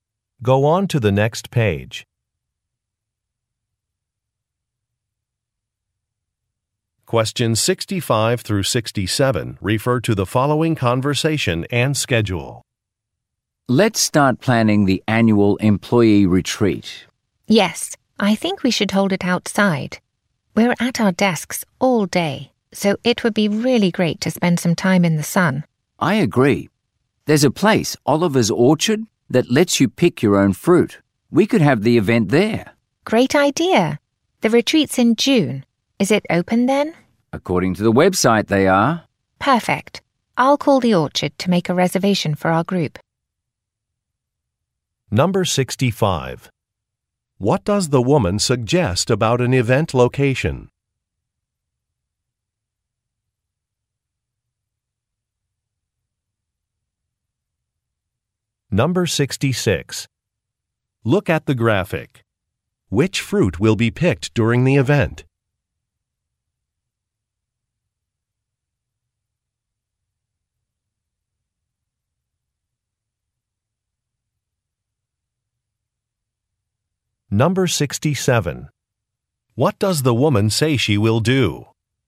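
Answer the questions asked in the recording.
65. It should be outdoors
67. Call the orchard to make a reservation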